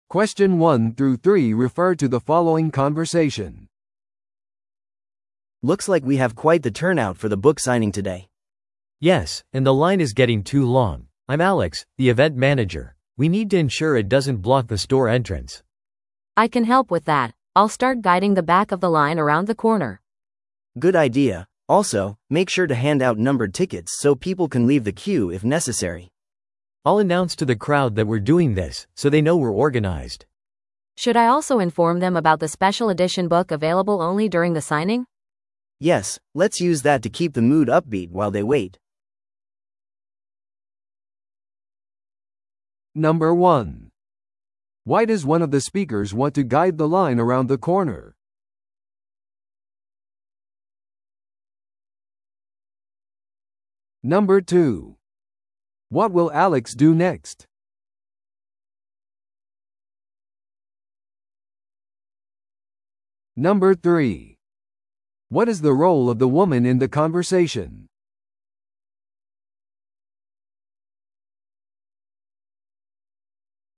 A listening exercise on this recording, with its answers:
Listen to the audio below and answer the questions.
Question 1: Why does one of the speakers want to guide the line around the corner?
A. より多くの参加者のためのスペースを作るため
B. 入口が塞がれないようにするため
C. 本のサイン会を開始するため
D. 宣伝用のチラシを配布するため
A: 入口が塞がれないようにするため

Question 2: What will Alex do next?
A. 参加者に番号付きのチケットを配る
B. 著者にスピーチをする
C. 人々を席に案内する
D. 観衆にチケットシステムについて知らせる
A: 観衆にチケットシステムについて知らせる

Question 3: What is the role of the woman in the conversation?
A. 番号付きのチケットを整理している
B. 本にサインをする著者である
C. 群衆を管理するのを手伝っている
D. 特別版の本を購入している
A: 群衆を管理するのを手伝っている

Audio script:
A: Looks like we have quite the turnout for the book signing today.
B: Yes, and the line is getting too long. I'm Alex, the event manager. We need to ensure it doesn't block the store entrance.
C: I can help with that. I'll start guiding the back of the line around the corner.
A: Good idea. Also, make sure to hand out numbered tickets so people can leave the queue if necessary.
B: I'll announce to the crowd that we're doing this, so they know we're organized.
C: Should I also inform them about the special edition book available only during the signing?
A: Yes, let's use that to keep the mood upbeat while they wait.

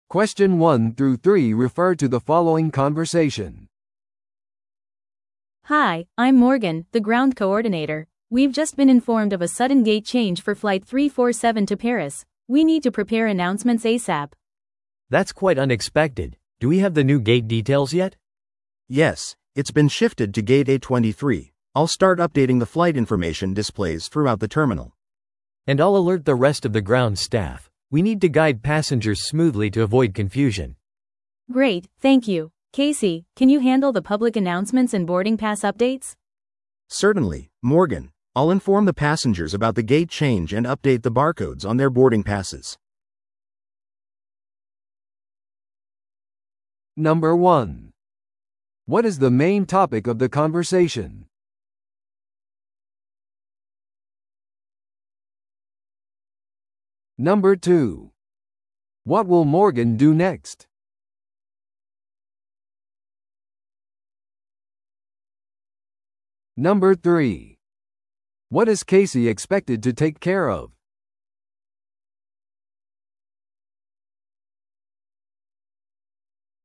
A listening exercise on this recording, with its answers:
Listen to the audio below and answer the questions.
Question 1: What is the main topic of the conversation?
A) 空港のセキュリティブリーフィングの手配。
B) 遅延しているフライトの対応。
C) 急なゲート変更のアナウンスの準備。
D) 乗客の座席配分の調整。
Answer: 急なゲート変更のアナウンスの準備。

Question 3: What is Casey expected to take care of?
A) 乗客を正しいターミナルに案内する。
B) ゲート変更のアナウンスと搭乗券の更新を行う。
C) 航空会社の本社との連携を取る。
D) 待機中の乗客にリフレッシュメントを提供する。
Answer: ゲート変更のアナウンスと搭乗券の更新を行う。

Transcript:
A: Hi, I'm Morgan, the ground coordinator. We've just been informed of a sudden gate change for Flight 347 to Paris. We need to prepare announcements ASAP.
B: That's quite unexpected. Do we have the new gate details yet?
C: Yes, it's been shifted to Gate A23. I'll start updating the flight information displays throughout the terminal.
B: And I'll alert the rest of the ground staff. We need to guide passengers smoothly to avoid confusion.
A: Great, thank you. Casey, can you handle the public announcements and boarding pass updates?
C: Certainly, Morgan. I'll inform the passengers about the gate change and update the barcodes on their boarding passes.

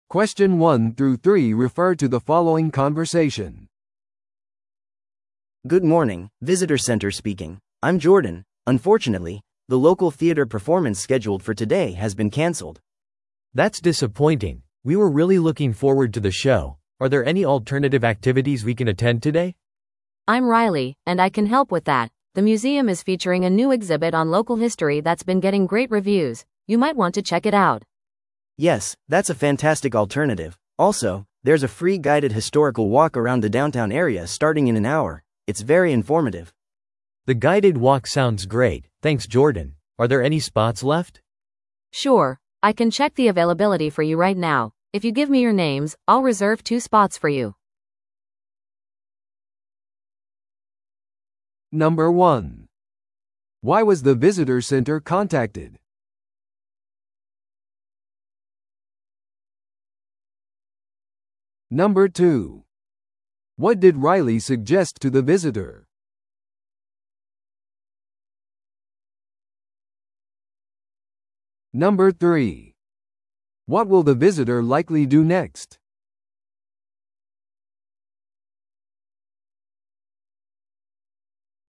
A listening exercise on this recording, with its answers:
Listen to the audio below and answer the questions.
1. Why was the visitor center contacted?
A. 演劇公演のスケジュールを決めるため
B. 中止になったイベントの代替案を探すため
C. 過去のアクティビティにフィードバックを残すため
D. 地元の博物館までの道順を知るため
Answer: 中止になったイベントの代替案を探すため

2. What did Riley suggest to the visitor?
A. 近くの劇場を訪れる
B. 博物館の新しい展示に参加する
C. ホテルの部屋を予約する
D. 市内の個人ツアーを受ける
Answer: 博物館の新しい展示に参加する

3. What will the visitor likely do next?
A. 無料のガイド付き歴史散策に申し込む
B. キャンセルを確認するために劇場へ行く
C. ガイドなしで博物館を訪れる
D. 観光案内所で1時間待つ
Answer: 無料のガイド付き歴史散策に申し込む

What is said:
A: Good morning, visitor center speaking. I'm Jordan. Unfortunately, the local theater performance scheduled for today has been canceled.
B: That's disappointing. We were really looking forward to the show. Are there any alternative activities we can attend today?
C: I'm Riley, and I can help with that. The museum is featuring a new exhibit on local history that's been getting great reviews. You might want to check it out.
A: Yes, that's a fantastic alternative. Also, there's a free guided historical walk around the downtown area starting in an hour. It's very informative.
B: The guided walk sounds great, thanks Jordan. Are there any spots left?
C: Sure, I can check the availability for you right now. If you give me your names, I'll reserve two spots for you.

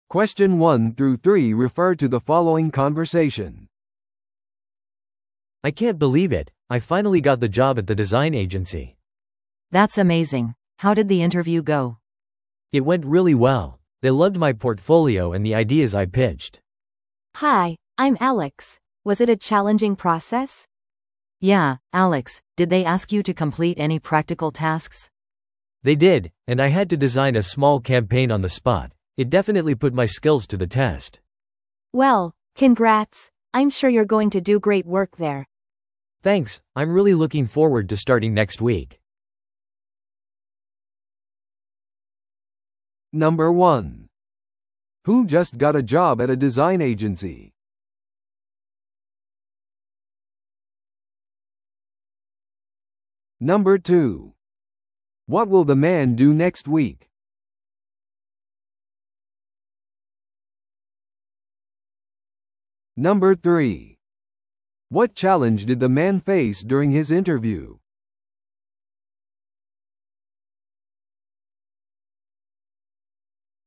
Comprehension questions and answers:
Listen to the audio below and answer the questions.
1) Who just got a job at a design agency?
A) 彼のポートフォリオについて言及した男性。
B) 面接について尋ねた女性。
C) アレックスと名乗った話者。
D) 実際のタスクをこなした男性。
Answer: 彼のポートフォリオについて言及した男性。

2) What will the man do next week?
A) 新しい仕事を始める。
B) 自己のポートフォリオを再確認する。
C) 別の面接を受ける。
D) キャンペーンのデザインを準備する。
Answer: 新しい仕事を始める。

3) What challenge did the man face during his interview?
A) デザイナーのチームを管理する必要があった。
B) その場でアイディアを提案することを求められた。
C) 複雑なアルゴリズムを解決する必要があった。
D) 競合他社と協力する必要があった。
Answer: その場でアイディアを提案することを求められた。

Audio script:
A: I can't believe it, I finally got the job at the design agency!
B: That's amazing! How did the interview go?
A: It went really well. They loved my portfolio and the ideas I pitched.
C: Hi, I'm Alex. Was it a challenging process?
B: Yeah, Alex, did they ask you to complete any practical tasks?
A: They did, and I had to design a small campaign on the spot. It definitely put my skills to the test.
C: Well, congrats! I'm sure you're going to do great work there.
A: Thanks, I'm really looking forward to starting next week.

